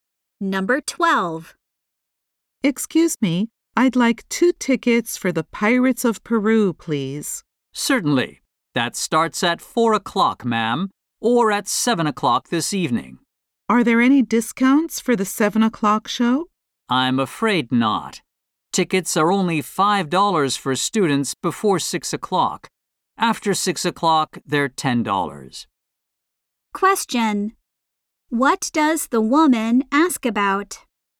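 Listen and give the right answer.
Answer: Discounts for the 7 o'clock show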